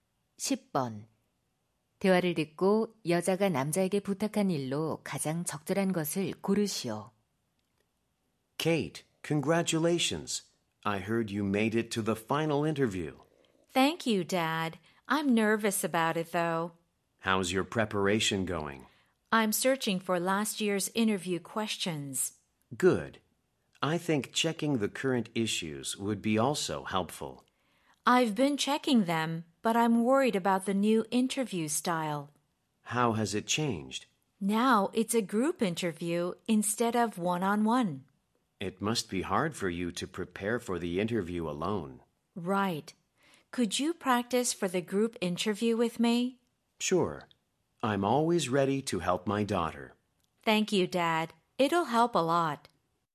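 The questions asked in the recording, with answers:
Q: 대화를 듣고 여자가 남자에게 부탁한 일로 가장 적절한 것을 고르시오.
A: 그룹 면접 연습을 함께 해 주기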